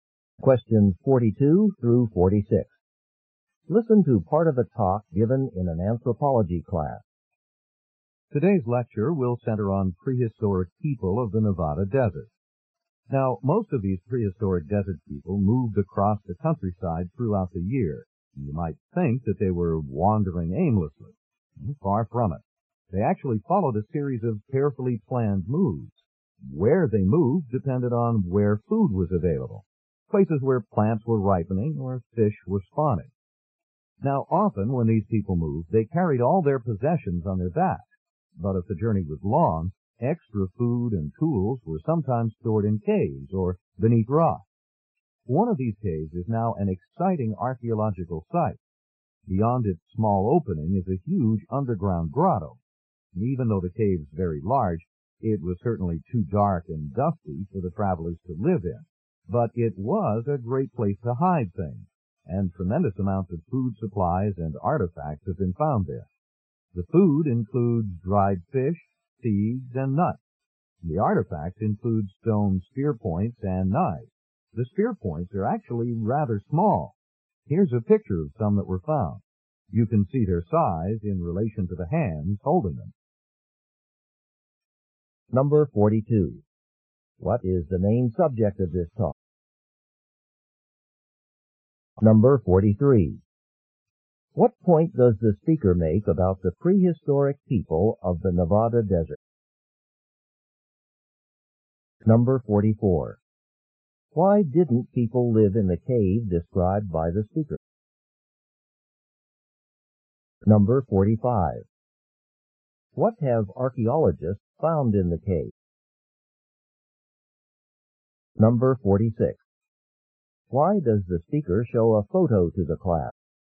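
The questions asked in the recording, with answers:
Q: What is the main subject of this talk?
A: Prehistoric people of the Nevada desert

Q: What point does the speaker make about the prehistoric people of the Nevada desert?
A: They followed carefully planned moves, going where food was available

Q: Why didn't people live in the cave described by the speaker?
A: It was too dark and dusty

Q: What have archaeologists found in the cave?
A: Food supplies and artifacts such as stone spear points and knives

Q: Why does the speaker show a photo to the class?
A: To show how small the spear points are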